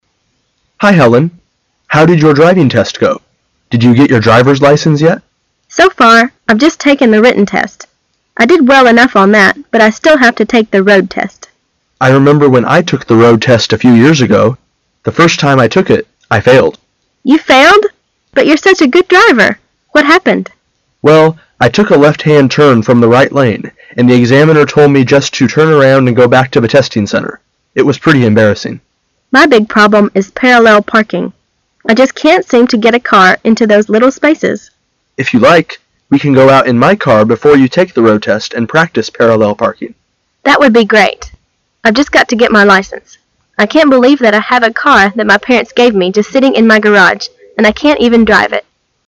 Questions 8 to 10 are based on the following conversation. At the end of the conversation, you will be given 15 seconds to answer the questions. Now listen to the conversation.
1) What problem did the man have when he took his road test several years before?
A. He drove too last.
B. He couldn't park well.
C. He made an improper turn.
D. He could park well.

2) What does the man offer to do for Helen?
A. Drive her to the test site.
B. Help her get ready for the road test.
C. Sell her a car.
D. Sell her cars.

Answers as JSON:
{"1": "C", "2": "B"}

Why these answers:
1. 弄清the man failed to the road test的原因。 [详细解答] The man回忆到几年前他参加the road test时,took a left-hand turn from the right lane。因此转错了车道而未通过。故选C。而Helen的问题是parallel parking。
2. 弄清细节。 [详细解答] Helen必须要参加the road test,但Her big problem is parallel parking。因此the man said:"If you like,we can go out in my car before you take the road test and practice parallel parking."帮助她为实地开车做好准备。A、C、D与本题无关。因此选B。

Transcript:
[解析] 8-10 M: Hi, Helen. How did your driving test go? Did you get your driver's license yet? F: So far, I've just taken the written test. I did well enough on that, but I still have to take the road test. M: I remember when I took the road test a few years ago. The first time I took it, I failed. F: You failed! But you're such a good driver! What happened? M: Well, I took a left-hand turn from the right lane, and the examiner told me just to turn around and go back to the testing center. It was pretty embarrassing. F: My big problem is parallel parking. I just can't seem to get a car into those little spaces. M: If you like, we can go out in my car before you take tile road test and practice parallel parking. F: That would be great. I've just got to get my license. I can't believe that I have a car that my parents gave me just sitting in my garage, and I can't even drive it.

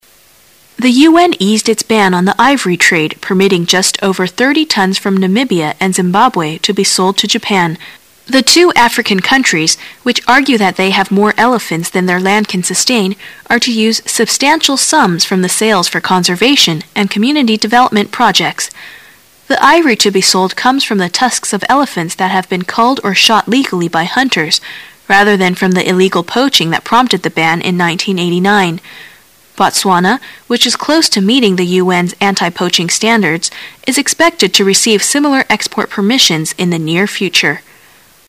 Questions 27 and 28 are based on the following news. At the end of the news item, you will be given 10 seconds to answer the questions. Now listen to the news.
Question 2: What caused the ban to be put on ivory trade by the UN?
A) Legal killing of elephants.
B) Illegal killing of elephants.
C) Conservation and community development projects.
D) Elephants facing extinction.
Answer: B

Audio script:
[解析] 27-28 The UN eased its ban on the ivory trade, permitting just over 30 tons from Namibia and Zimbabwe to be sold to Japan. The two African countries, which argue that they have more elephants than their land can sustain, are to use "substantial sums" from the sales for conservation and community development projects. The ivory to be sold comes from the tusks of elephants that have been culled or shot legally by hunters, rather than from the illegal poaching that prompted the ban in 1989. Botswana, which is close to meeting the UN's anti-poaching standards, is expected to receive similar export permission in the near future.

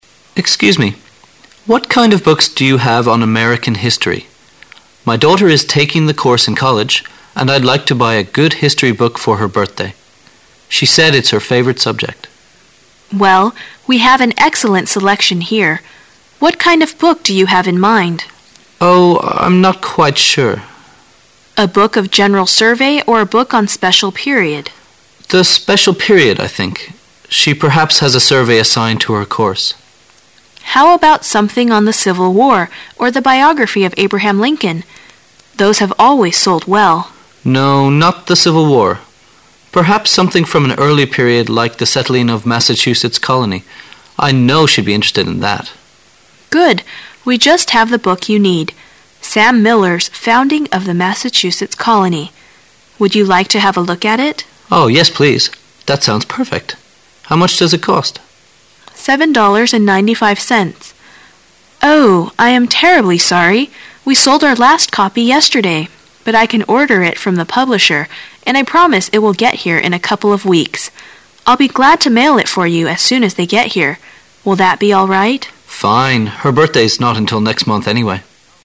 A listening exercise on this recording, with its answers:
Questions 4 to 7 are based on the following conversation. At the end of the conversation, you will be given 20 seconds to answer the questions. Now listen to the conversation.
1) Why does the man want to give her daughter a history book?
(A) Because she doesn't know much about history.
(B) Because he himself likes history very much.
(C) Because she needs the book for a course she is taking.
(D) Because history is her favourite subject in college.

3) What does the book seller say about the books on Civil War?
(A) They are very popular.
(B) They tend to be dull.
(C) They are usually biographical.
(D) They are highly specialized.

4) How long does the book seller say it'll take to obtain the book which the man wants?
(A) No longer than a day.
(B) Until the next mail comes in.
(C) Around two weeks.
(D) Around two months.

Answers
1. D
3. A
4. C

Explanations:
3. 本题测试推测理解能力。根据文中店员所说的"Those have always sold well",可推测这些关于内战的书一直很受欢迎,因此正确答案为A。
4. 本题测试关于时间长度的细节内容的理解能力。根据店员所说,她可以预订顾客所需之书,并且保证书将在"a couple of weeks"之后到,因此正确答案为C。

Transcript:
[解析] 4-7 M: Excuse me. What kind of books do you have on American history? My daughter is taking the course in college and I'd like to buy a good history book for her birthday. She said it's her favourite subject. W: Well. We have an excellent selection here. What kind of book do you have in mind? M: Oh, I'm not quite sure. W: A book of general survey or a book on special period? M: The special period I think. She perhaps has a survey assigned to her course. W: How about something on the Civil War or the biography of Abraham Lincoln! Those have always sold well. M: No, not the Civil War. Perhaps something from an early period like the settling of Massachusetts colony. I know she'd be interested in that. W: Good. We just have the book you need. Sam Miller's Founding of the Massachusetts Colony. Would you like to have a look at it? M: Yes, please. That sounds perfect. How much does it cost? W: $7.95. Oh, I am terribly sorry. We sold our last copy yesterday, but I can order it from the publisher and I promise it will get here in a couple of weeks. I'll be glad to mail it for you as soon as they get here. Will that be all right?

